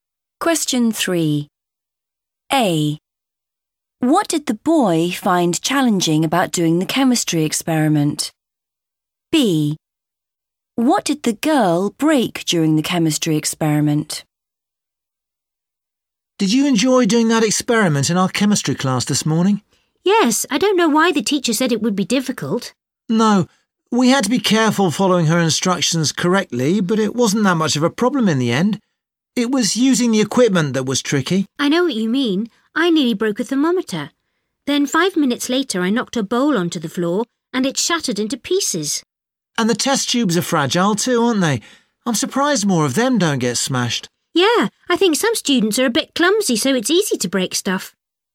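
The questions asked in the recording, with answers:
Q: What did the boy find challenging about doing the chemistry experiment?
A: using the equipment

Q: What did the girl break during the chemistry experiment?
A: a bowl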